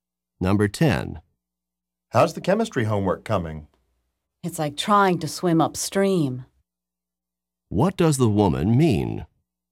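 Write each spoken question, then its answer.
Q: What does the woman mean?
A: The homework is very difficult.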